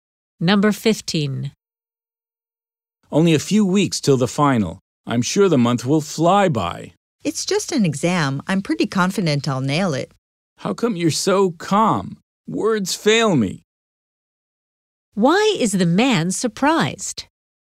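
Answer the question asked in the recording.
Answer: The woman is very calm about the final exam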